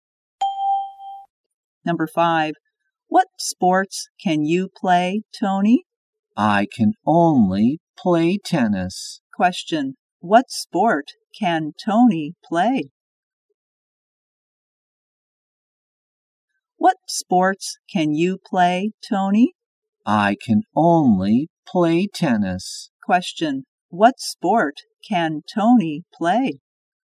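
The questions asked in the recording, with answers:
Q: What sport can Tony play?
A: Tennis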